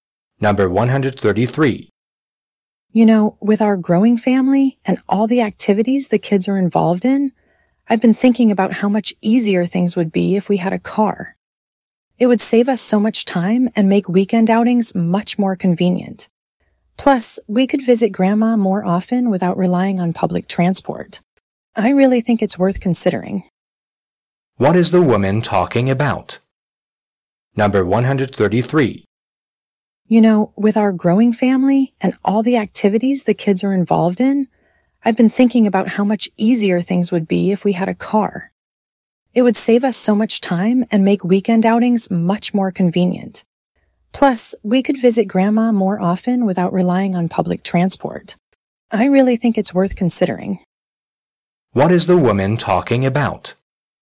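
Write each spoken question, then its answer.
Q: What is the woman talking about?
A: Buying a car for the family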